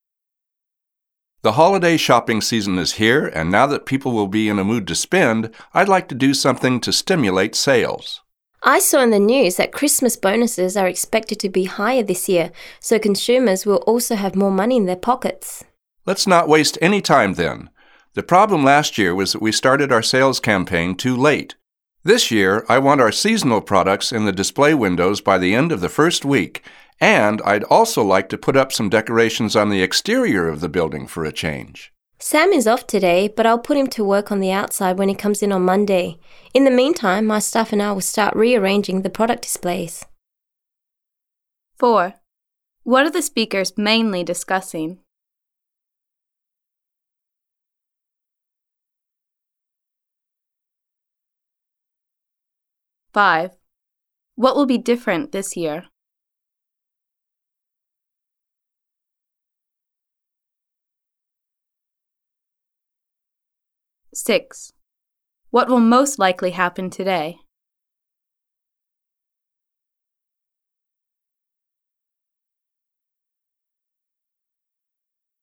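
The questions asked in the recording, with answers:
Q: What are the speakers mainly discussing?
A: Plans to boost sales for the holiday shopping season

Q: What will most likely happen today?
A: The staff will start rearranging the product displays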